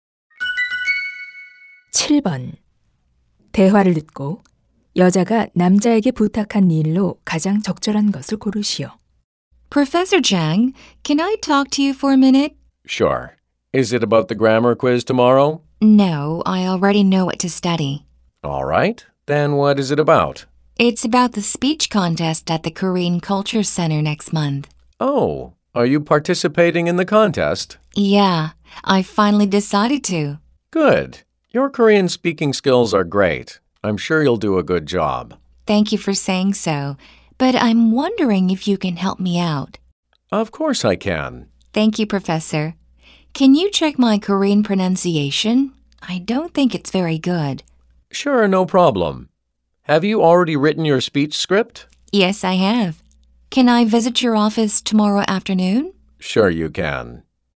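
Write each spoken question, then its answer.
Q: 대화를 듣고 여자가 남자에게 부탁한 일로 가장 적절한 것을 고르시오.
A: 한국어 발음 확인해 주기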